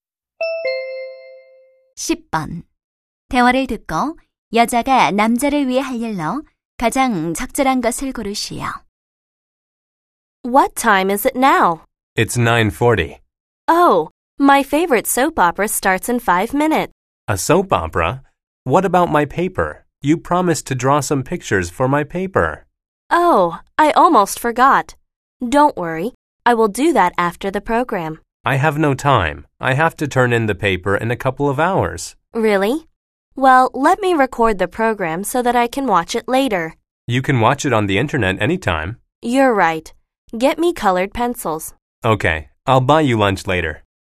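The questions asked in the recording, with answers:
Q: 대화를 듣고 여자가 남자를 위해 할 일로 가장 적절한 것을 고르시오.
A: 리포트에 들어갈 그림 그려 주기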